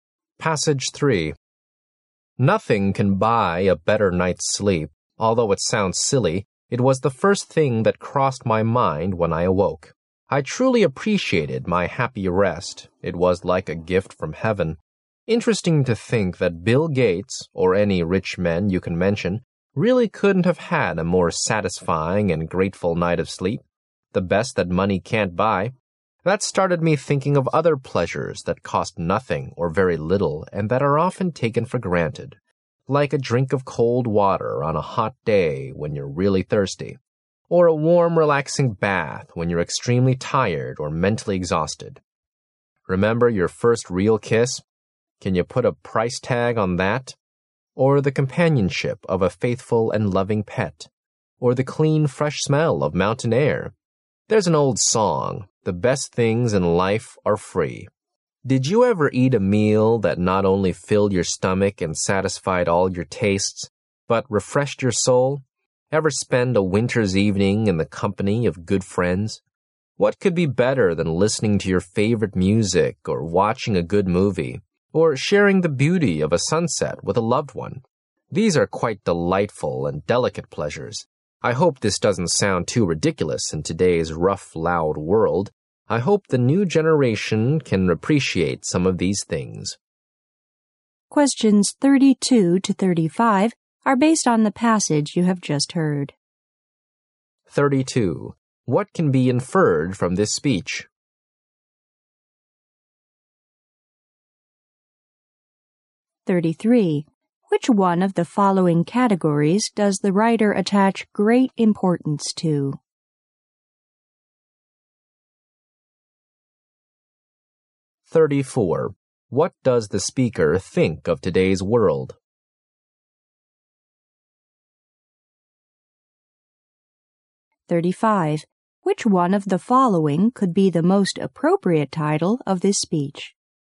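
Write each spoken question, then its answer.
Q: What does the speaker think of today's world?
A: It is rough and loud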